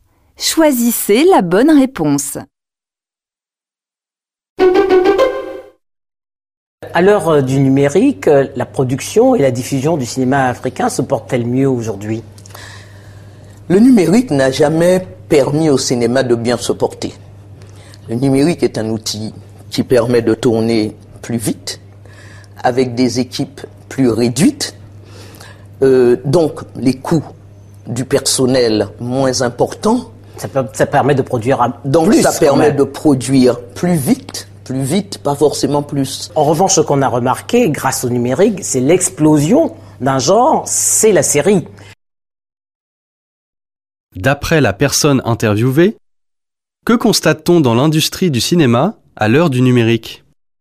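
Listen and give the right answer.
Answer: L'explosion d'un genre : la série (on produit aussi plus vite, mais pas forcément plus).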